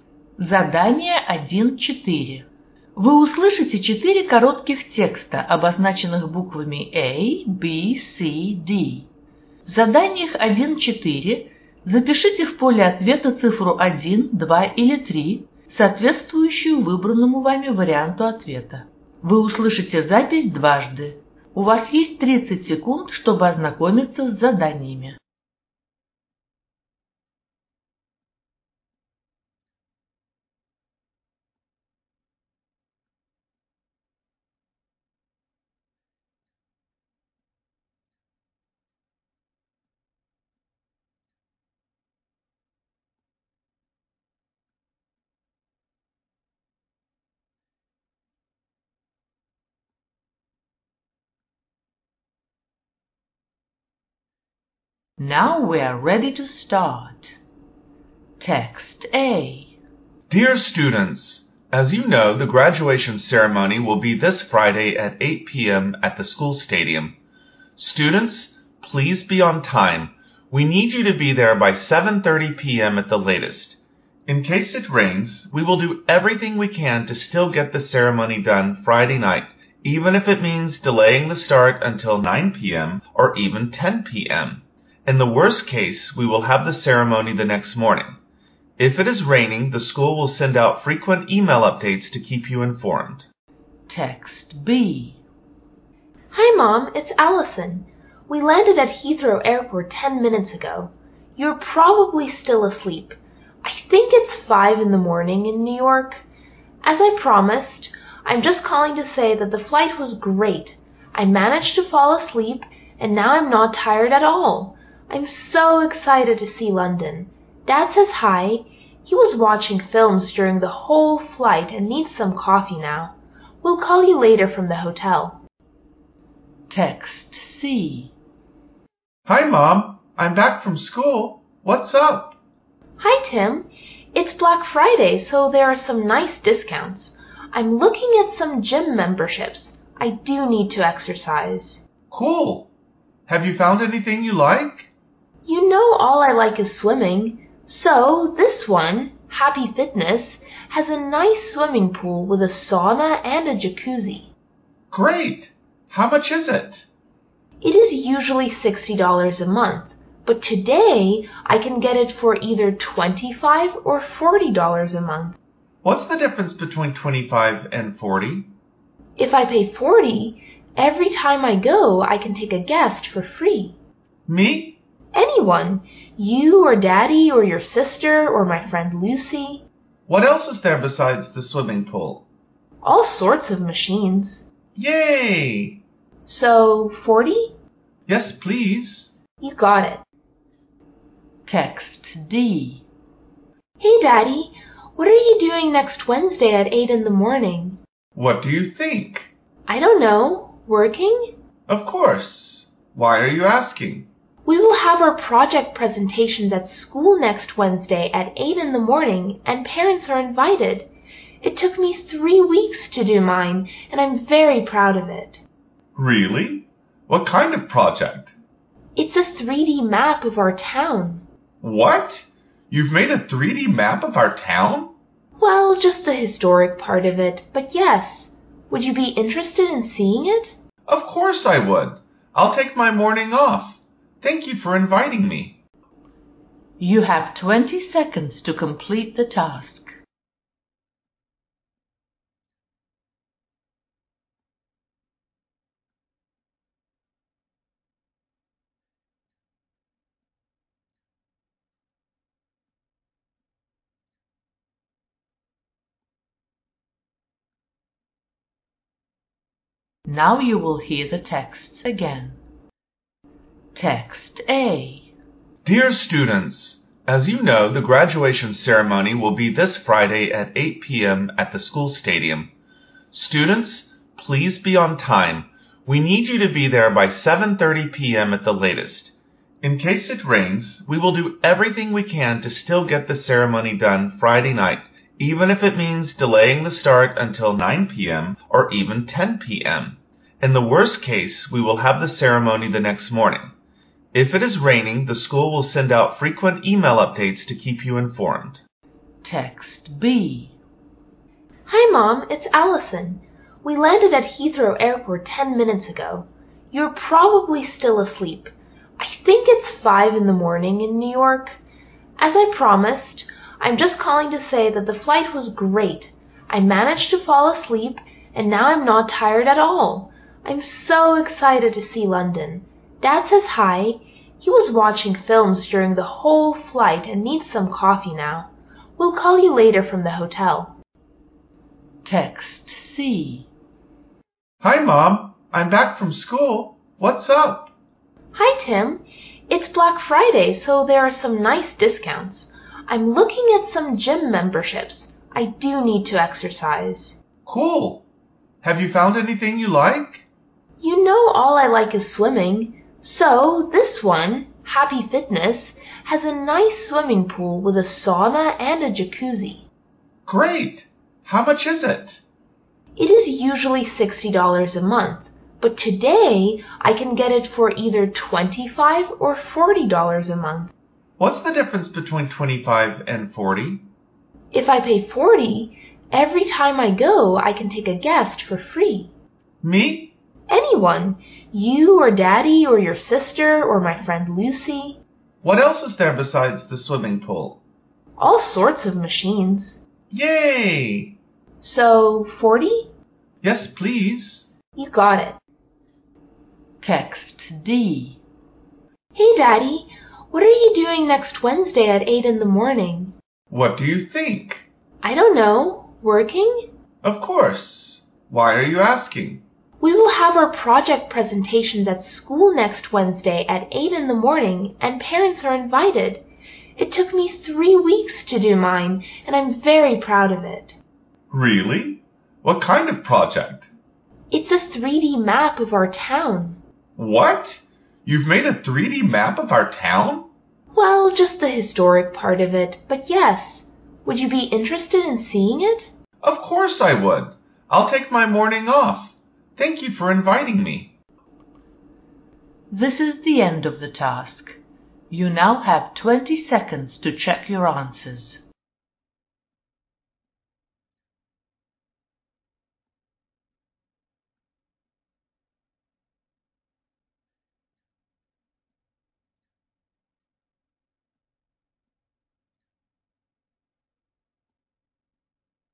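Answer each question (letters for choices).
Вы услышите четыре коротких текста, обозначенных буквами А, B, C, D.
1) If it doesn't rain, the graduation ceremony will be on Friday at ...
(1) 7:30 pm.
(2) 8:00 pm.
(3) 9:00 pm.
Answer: 2

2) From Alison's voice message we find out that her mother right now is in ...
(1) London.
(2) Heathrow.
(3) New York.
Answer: 3

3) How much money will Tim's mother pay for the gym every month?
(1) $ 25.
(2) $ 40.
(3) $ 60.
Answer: 2

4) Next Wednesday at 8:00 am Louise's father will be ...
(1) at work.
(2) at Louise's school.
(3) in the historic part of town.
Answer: 2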